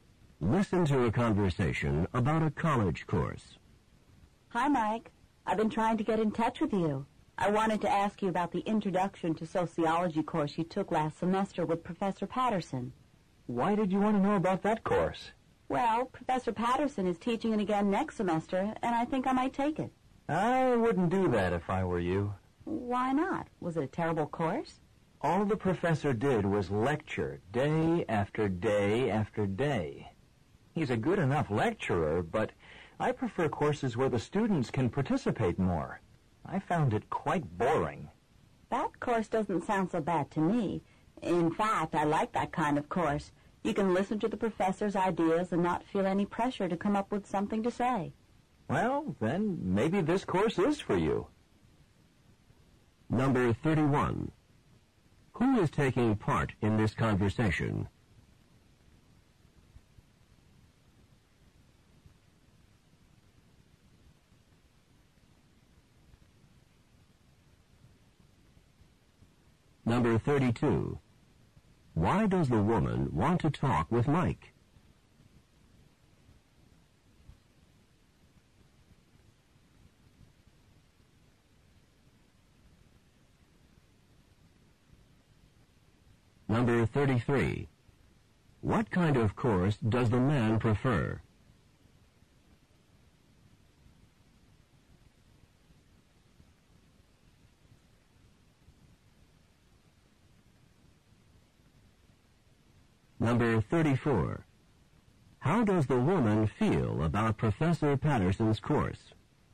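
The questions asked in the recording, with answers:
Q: Why does the woman want to talk with Mike?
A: To ask about the introduction to sociology course he took last semester

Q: What kind of course does the man prefer?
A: Courses where students can participate more

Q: How does the woman feel about Professor Patterson's course?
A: It doesn't sound bad; she likes that kind of course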